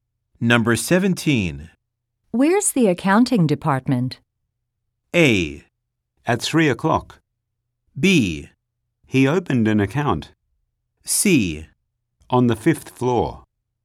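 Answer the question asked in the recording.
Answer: C: On the 5th floor.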